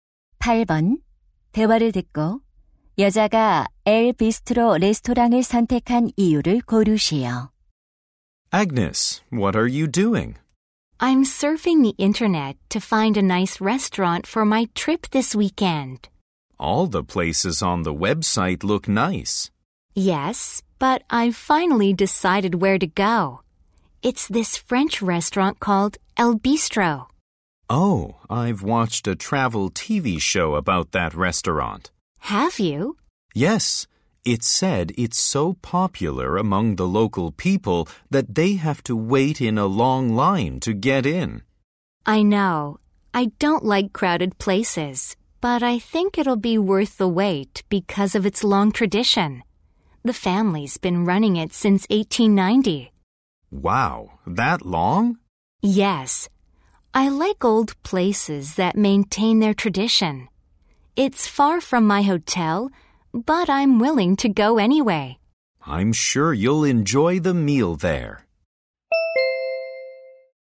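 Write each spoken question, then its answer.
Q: 대화를 듣고 여자가 엘 비스트로 레스토랑을 선택한 이유를 고르시오.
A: 오랜 전통이 있어서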